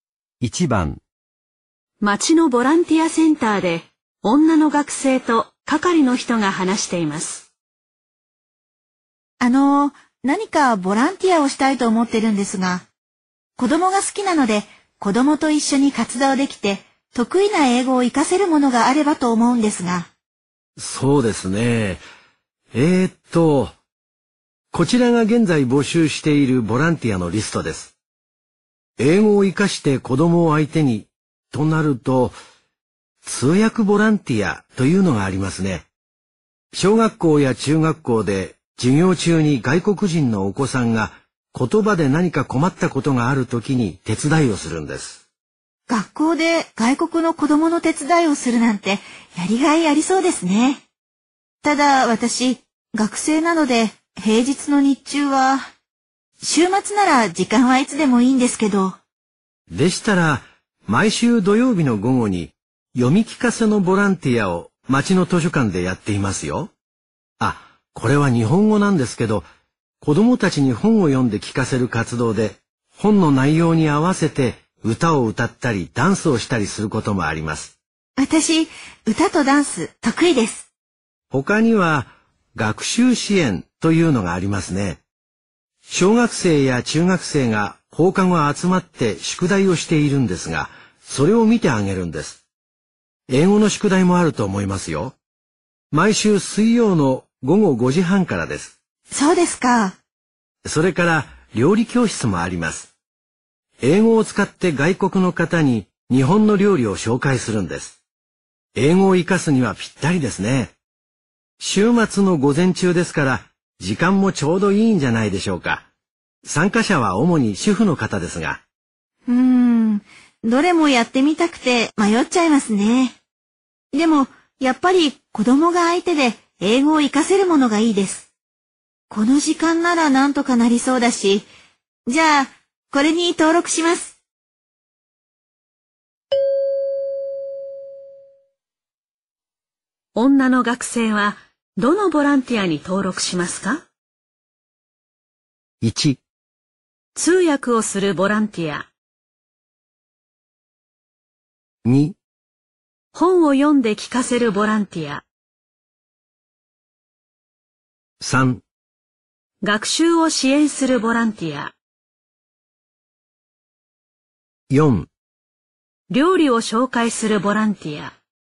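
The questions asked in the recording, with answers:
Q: 女の学生は、どのボランティアに登録しますか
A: 3: 学習を支援するボランティア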